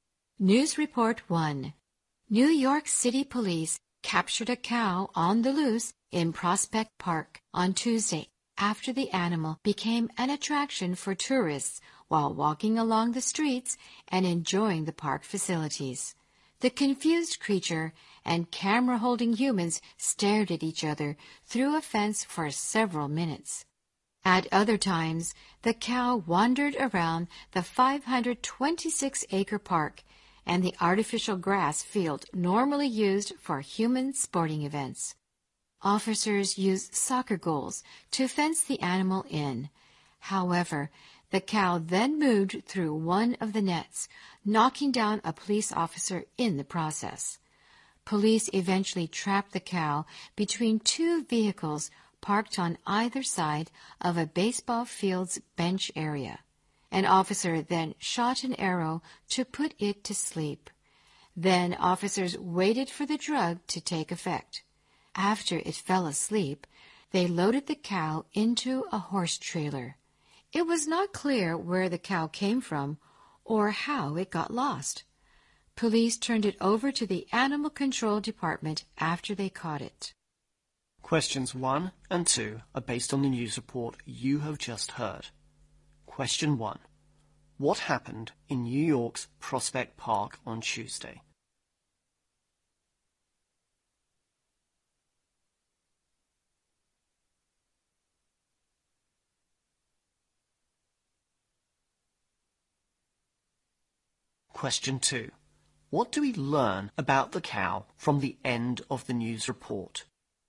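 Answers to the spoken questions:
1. Police captured a cow on the loose that had become a tourist attraction
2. It was unclear where it came from; it was handed to Animal Control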